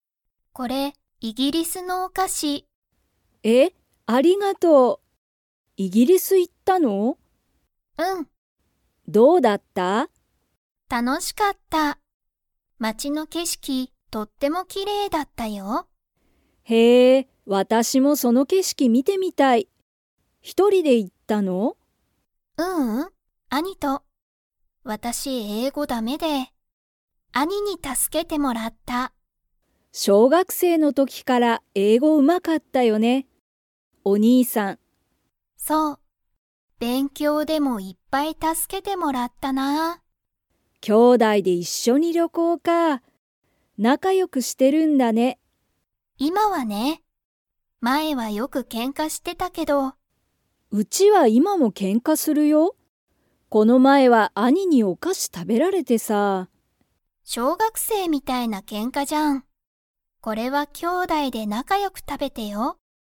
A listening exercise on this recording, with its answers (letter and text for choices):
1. るみは、イギリスの を見みてみたい。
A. お菓子かし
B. 料理りょうり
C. 景色けしき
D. けんか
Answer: C. 景色けしき

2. りかは、イギリスに一人ひとりで行いきましたか?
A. はい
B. いいえ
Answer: B. いいえ

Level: Level 4